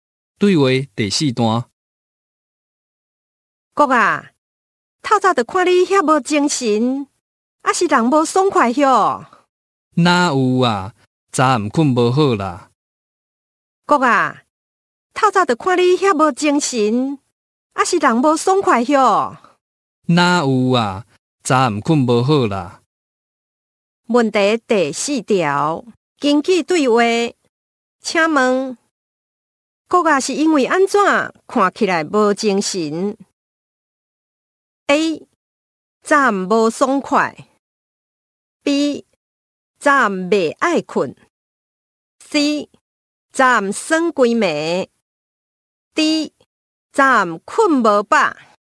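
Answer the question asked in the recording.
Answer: D: 站困无饱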